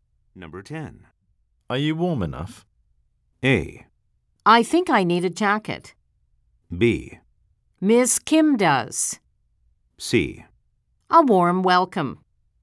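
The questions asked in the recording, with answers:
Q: Are you warm enough?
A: A: I think I need a jacket.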